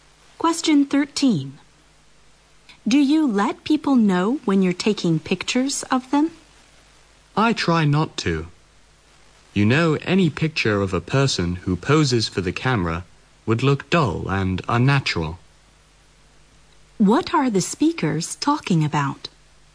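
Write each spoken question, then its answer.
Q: What are the speakers talking about?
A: Taking pictures of people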